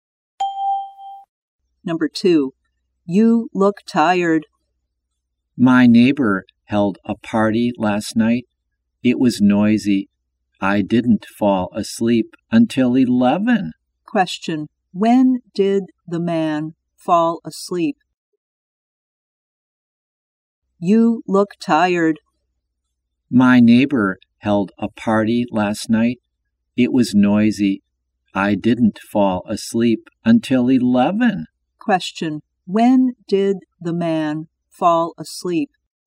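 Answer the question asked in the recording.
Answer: At 11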